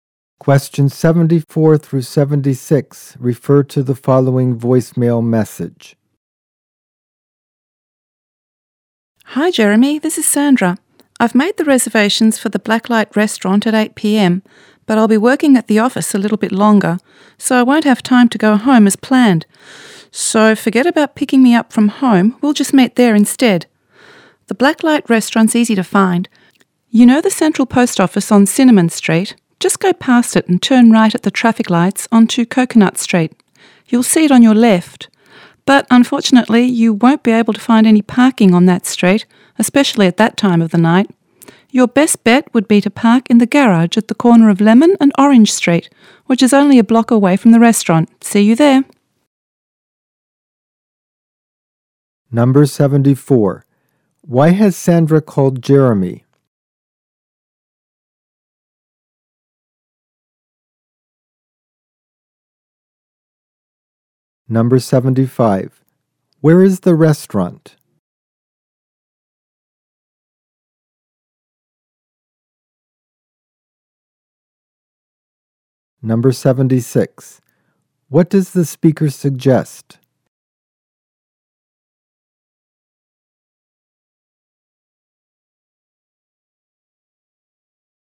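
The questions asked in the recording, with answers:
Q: Why has Sandra called Jeremy?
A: To say she will meet him at the restaurant instead of being picked up at home

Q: Where is the restaurant?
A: On Coconut Street, past the central post office, on the left

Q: What does the speaker suggest?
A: Parking in the garage at the corner of Lemon and Orange Street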